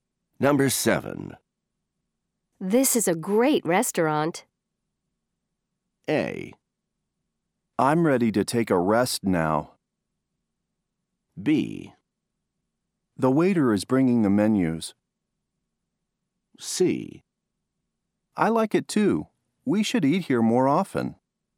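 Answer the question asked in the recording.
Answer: C: I like it too. We should eat here more often.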